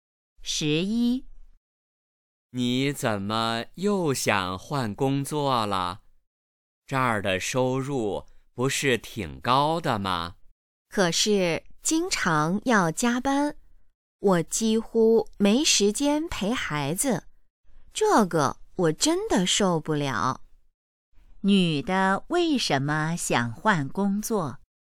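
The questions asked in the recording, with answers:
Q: 女的为什么想换工作?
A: 经常加班,没时间陪孩子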